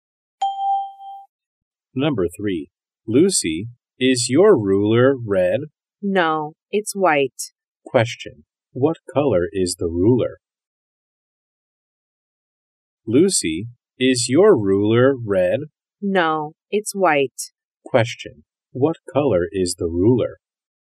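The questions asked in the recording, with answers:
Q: what color is the ruler?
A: White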